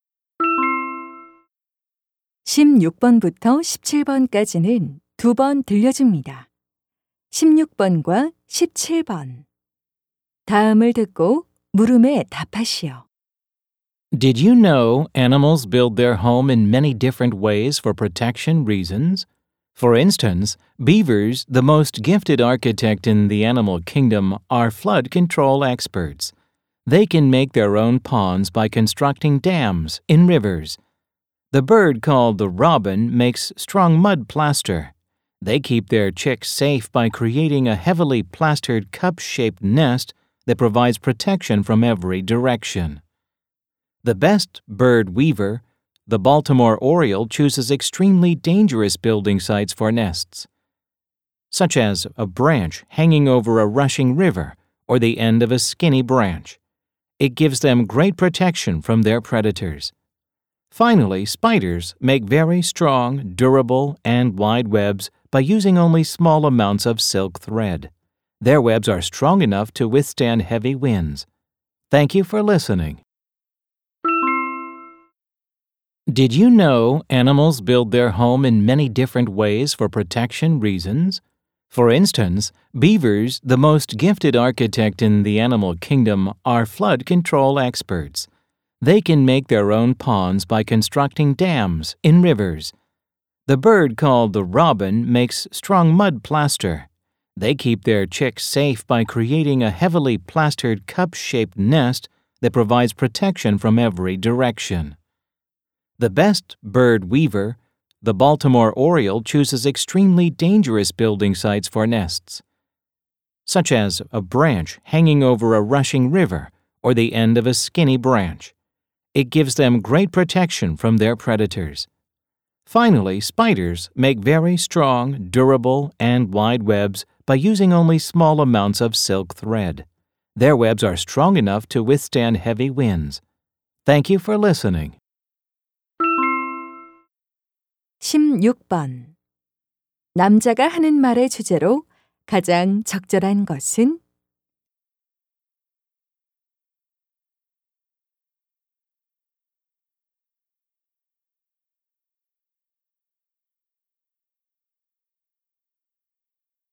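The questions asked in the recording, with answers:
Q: 남자가 하는 말의 주제로 가장 적절한 것은?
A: 동물들이 보호를 위해 다양한 방식으로 집을 짓는 방법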